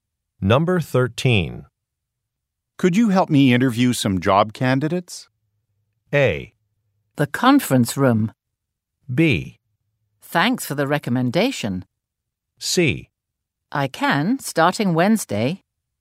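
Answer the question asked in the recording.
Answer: C: I can, starting Wednesday.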